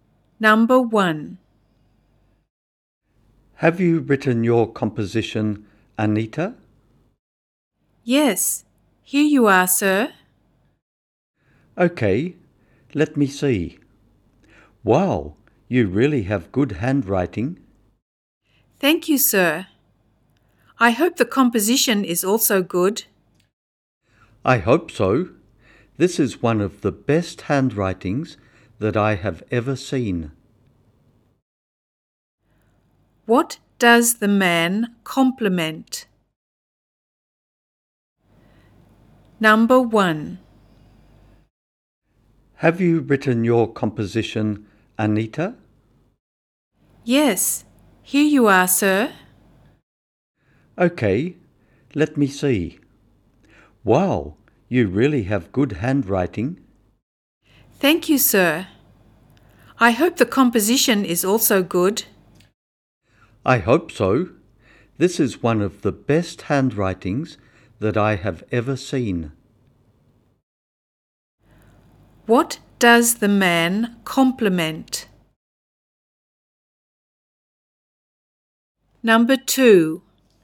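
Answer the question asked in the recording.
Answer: Anita's handwriting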